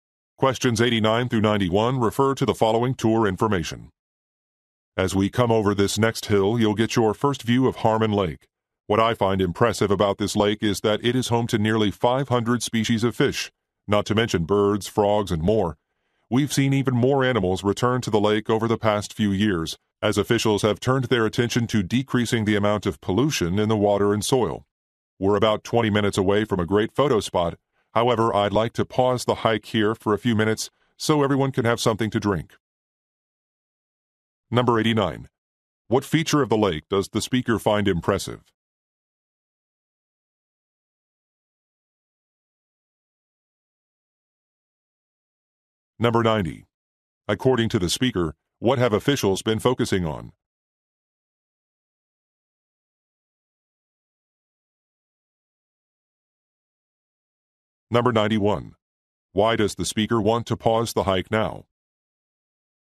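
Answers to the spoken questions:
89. It is home to nearly 500 fish species
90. Reducing pollution
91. So everyone can have something to drink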